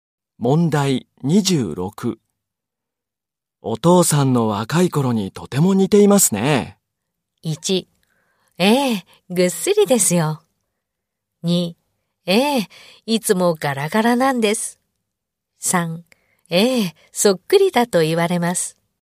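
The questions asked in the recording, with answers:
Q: お父さんの若い頃にとても似ていますね。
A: 3: ええ、そっくりだと言われます。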